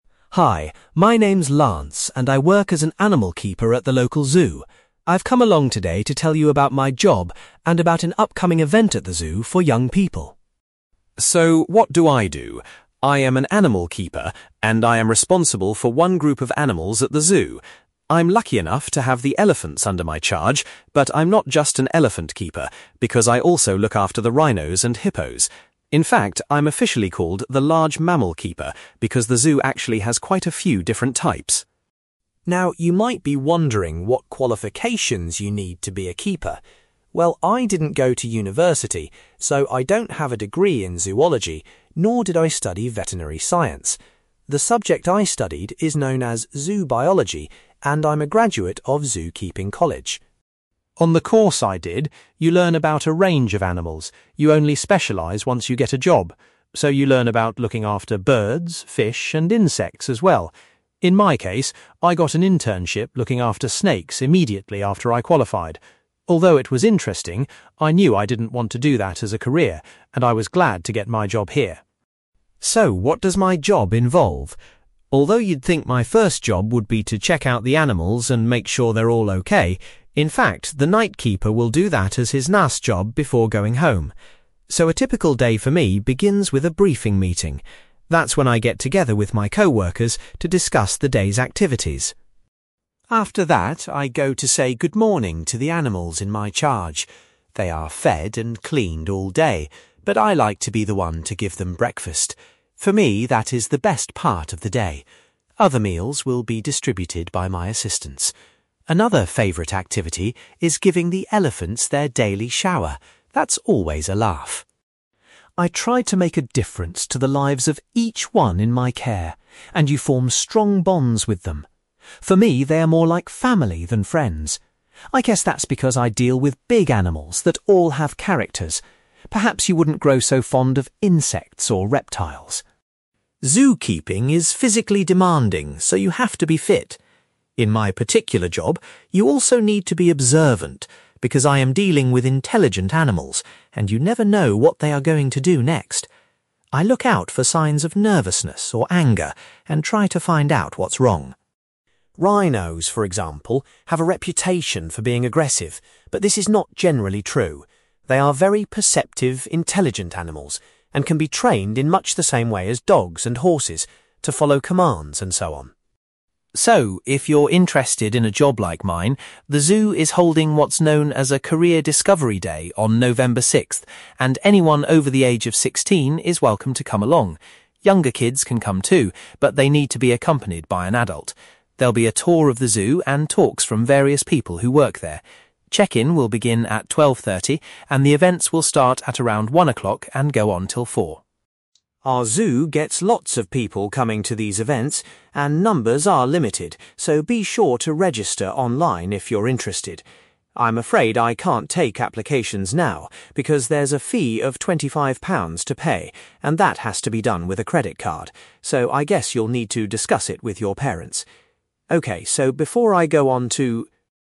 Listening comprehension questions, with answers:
You will hear a man called Lance Arbury telling a group about his job at a zoo. For questions 9-18, complete the sentences with a word or short phrase.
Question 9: Lance's official job title at the zoo is (9)........................... keeper.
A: large mammal

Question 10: The subject which Lance studied at college is (10)........................... .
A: zoo biology

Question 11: During his internship, Lance had a job looking after (11)........................... .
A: snakes

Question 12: When Lance arrives at work each day, his first task is usually to go to a (12)........................... .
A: briefing meeting

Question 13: Lance's favourite part of the day is when he gives the animals their (13)........................... .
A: breakfast

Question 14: Lance says that he tends to regard the animals as his (14)........................... .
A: family

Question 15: Lance says that for his job he has to be (15)........................... as well as physically fit.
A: observant

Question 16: Lance disagrees with people who think that rhinos are (16)........................... by nature.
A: aggressive

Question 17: Lance invites his audience to attend what's called a (17)........................... at the zoo.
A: Career Discovery Day

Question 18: Lance recommends those wishing to attend to (18)........................... to be sure of a place.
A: register online

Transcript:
Lance: Hi, my name's Lance and I work as an animal keeper at the local zoo. I've come along today to tell you about my job and about an upcoming event at the zoo for young people.
So what do I do? I am an animal keeper, and I am responsible for one group of animals at the zoo. I'm lucky enough to have the elephants under my charge, but I'm not just an elephant keeper because I also look after the rhinos and hippos. In fact, I'm officially called the large mammal keeper, because the zoo actually has quite a few different types.
Now you might be wondering what qualifications you need to be a keeper. Well I didn't go to university, so I don't have a degree in zoology, nor did I study veterinary science. The subject I studied is known as zoo biology and I'm a graduate of zoo-keeping college.
On the course I did, you learn about a range of animals – you only specialise once you get a job. So you learn about looking after birds, fish and insects as well. In my case, I got an internship looking after snakes immediately after I qualified. Although it was interesting, I knew I didn't want to do that as a career, and I was glad to get my job here.
So what does my job involve? Although you'd think my first job would be to check out the animals and make sure they're all OK, in fact the night keeper will do that as his last job before going home. So a typical day for me begins with a briefing meeting. That's when I get together with my co-workers to discuss the day's activities.
After that, I go to say good morning to the animals in my charge. They are fed and cleaned all day, but I like to be the one to give them breakfast. For me that is the best part of the day. Other meals will be distributed by my assistants. Another favourite activity is giving the elephants their daily shower – that's always a laugh.
I try to make a difference to the lives of each one in my care, and you form strong bonds with them. For me they are more like family than friends. I guess that's because I deal with big animals that all have characters – perhaps you wouldn't grow so fond of insects or reptiles.
Zoo-keeping is physically demanding, so you have to be fit. In my particular job, you also need to be observant, because I am dealing with intelligent animals, and you never know what they are going to do next. I look out for signs of nervousness or anger and try to find out what's wrong.
Rhinos, for example, have a reputation for being aggressive, but this is not generally true. They are very perceptive intelligent animals and can be trained in much the same way as dogs and horses, to follow commands and so on.
So, if you're interested in a job like mine, the zoo is holding what's known as a Career Discovery Day on November sixth, and anyone over the age of sixteen is welcome to come along. Younger kids can come too – but they need to be accompanied by an adult. There'll be a tour of the zoo and talks from various people who work there. Check-in will begin at 12:30 and the events will start at around one a clock and go on till four.
Our zoo gets lots of people coming to these events, and numbers are limited, so be sure to register online if you're interested. I'm afraid I can't take applications now because there's a fee of £25 to pay and that has to be done with a credit card. So I guess you'll need to discuss it with your parents. OK, so before I go on to ...

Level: B2 English Listening Exercise